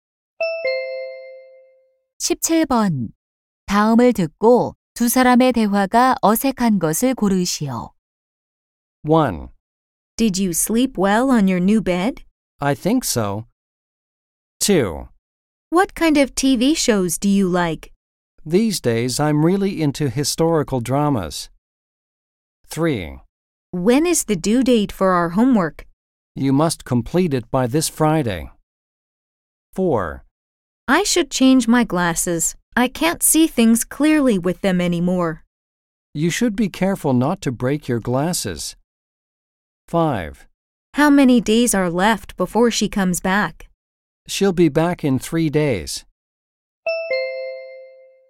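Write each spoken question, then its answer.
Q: 다음을 듣고 두 사람의 대화가 어색한 것을 고르시오.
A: 4: I should change my glasses. I can't see things clearly with them anymore. / You should be careful not to break your glasses.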